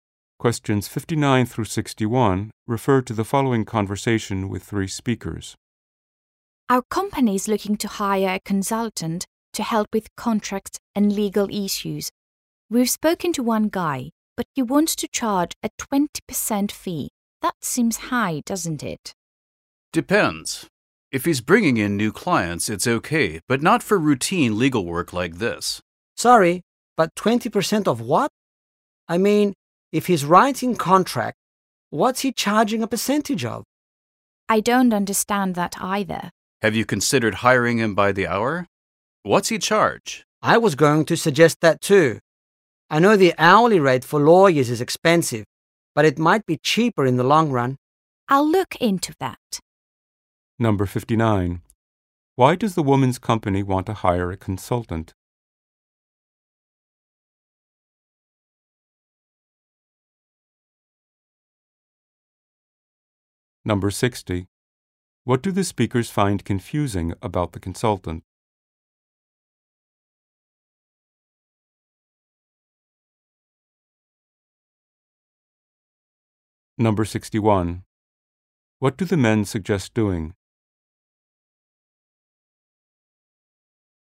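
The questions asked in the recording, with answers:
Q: Why does the woman's company want to hire a consultant?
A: To help with contracts and legal issues

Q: What do the speakers find confusing about the consultant?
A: What his 20% fee is a percentage of

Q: What do the men suggest doing?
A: Hiring him by the hour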